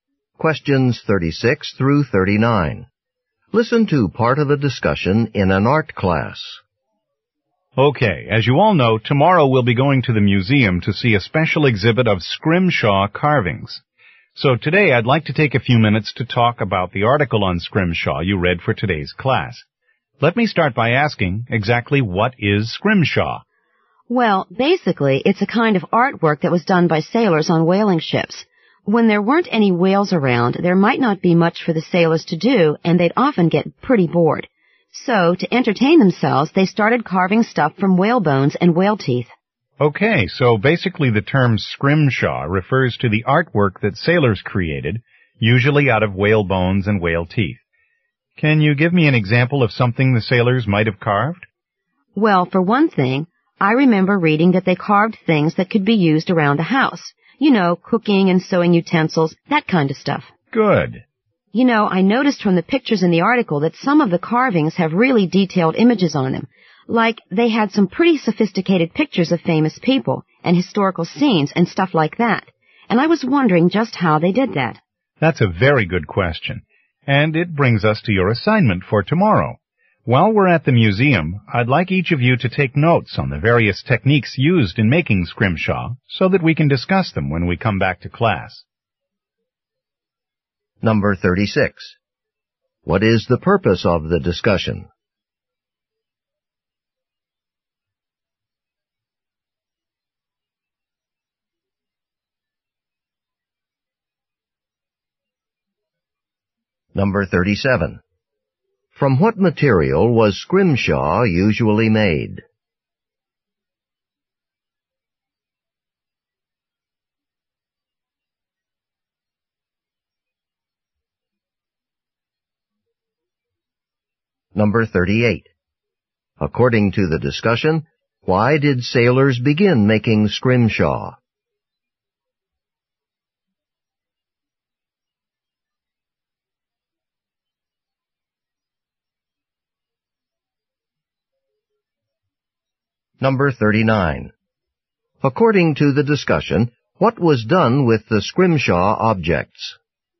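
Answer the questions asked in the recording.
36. To prepare for the class trip to the museum's scrimshaw exhibit.
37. Whale bones and whale teeth.
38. To entertain themselves when they were bored.
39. They were used around the house, for example as cooking and sewing utensils.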